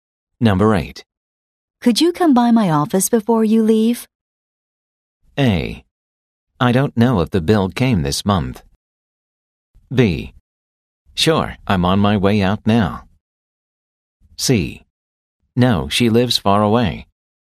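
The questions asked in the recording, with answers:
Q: Could you come by my office before you leave?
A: B: Sure, I'm on my way out now.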